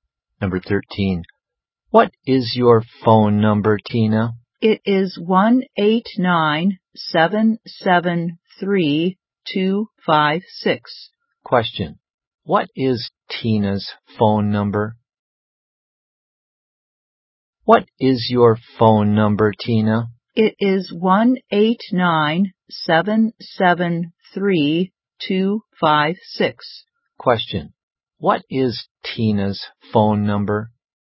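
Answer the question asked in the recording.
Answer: 1-879-773-256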